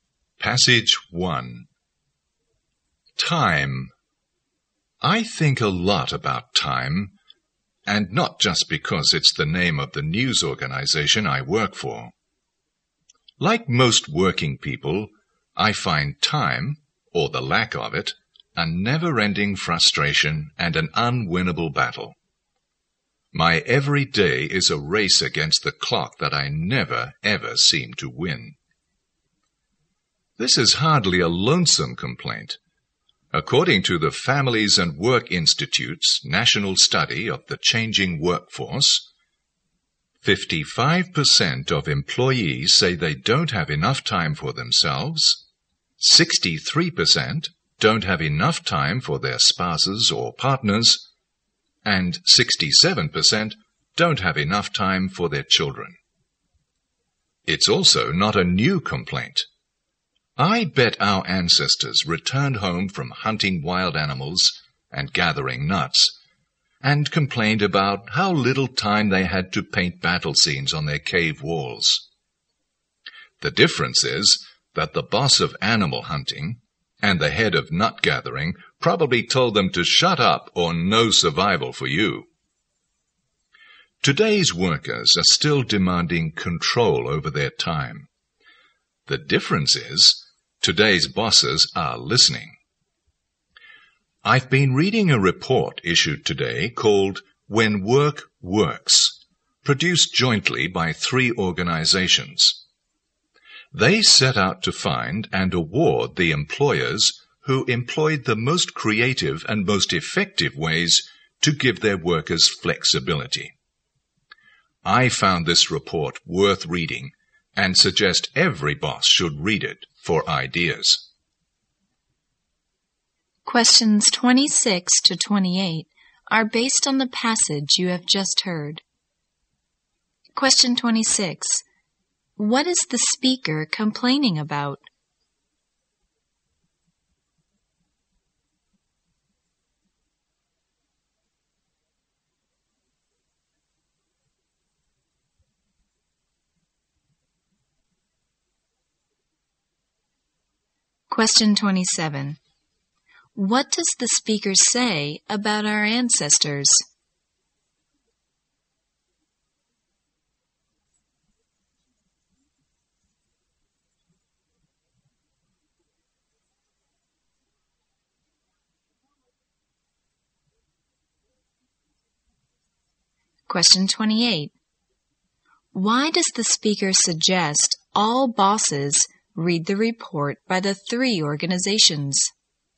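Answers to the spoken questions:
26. The lack of time
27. They also complained about having little time
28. To get ideas for giving workers flexibility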